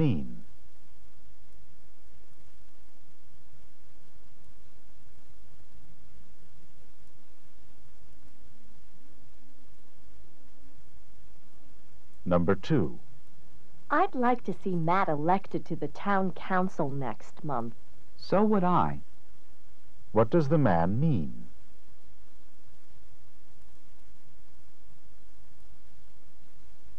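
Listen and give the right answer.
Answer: He also wants Matt elected.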